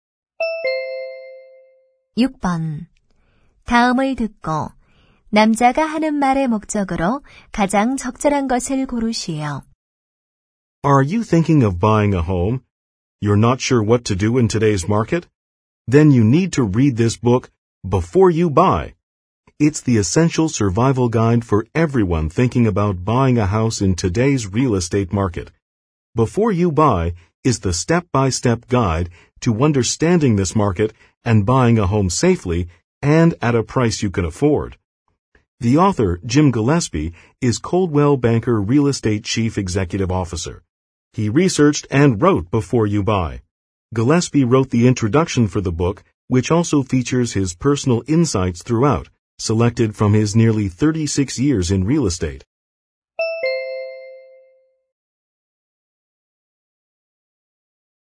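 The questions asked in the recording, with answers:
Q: 다음을 듣고 남자가 하는 말의 목적으로 가장 적절한 것을 고르시오.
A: 책 홍보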